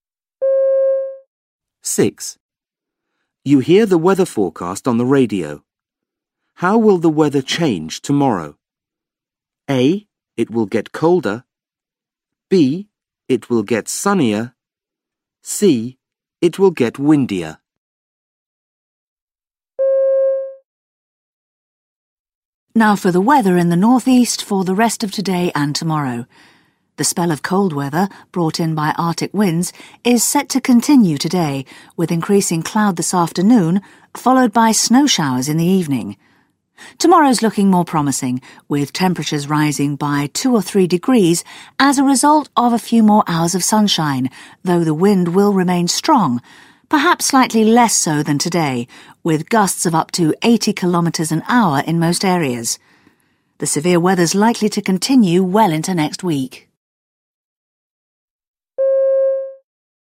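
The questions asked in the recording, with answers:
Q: How will the weather change tomorrow?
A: B: It will get sunnier.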